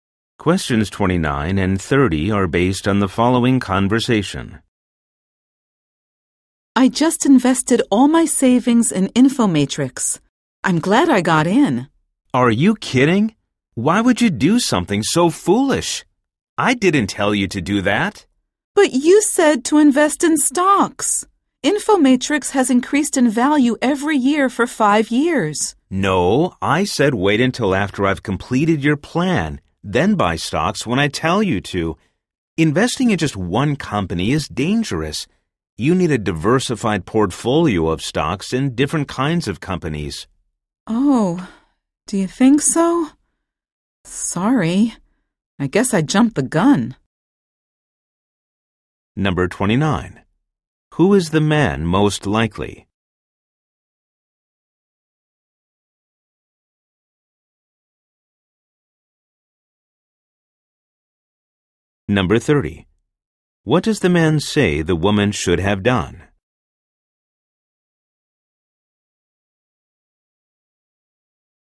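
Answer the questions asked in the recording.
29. A financial planner
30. Waited for his plan and bought a diversified portfolio of stocks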